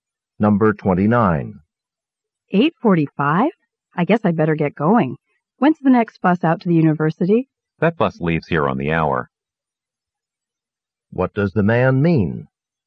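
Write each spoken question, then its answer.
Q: What does the man mean?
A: The next bus leaves at 9:00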